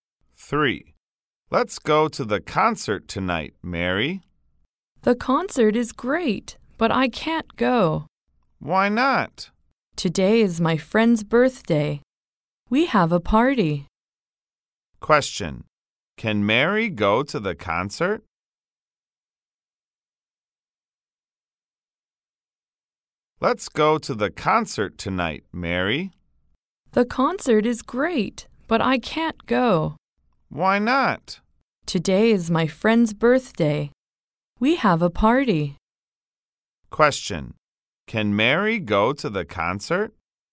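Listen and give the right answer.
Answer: No, she can't.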